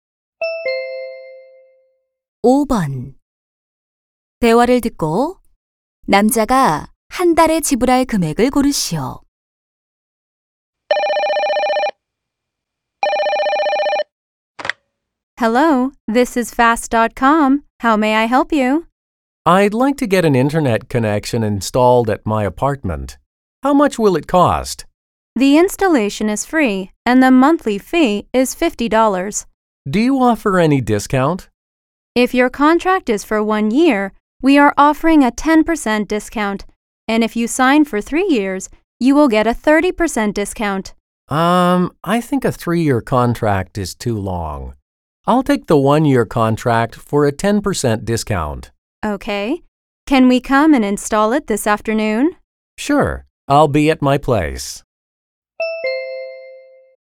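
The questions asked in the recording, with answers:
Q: 대화를 듣고 남자가 한 달에 지불할 금액을 고르시오.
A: 45달러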